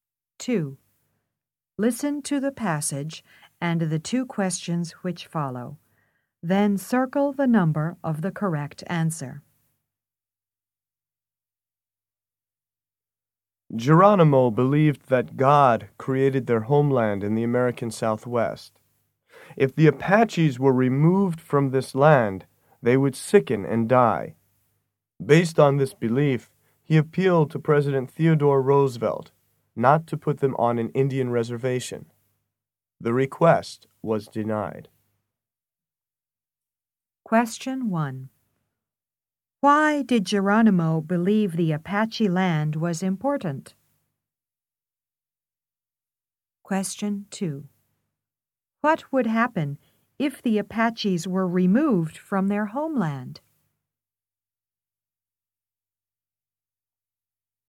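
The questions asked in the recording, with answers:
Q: Why did Geronimo believe the Apache land was important?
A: He believed God created their homeland in the American Southwest.

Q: What would happen if the Apaches were removed from their homeland?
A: They would sicken and die.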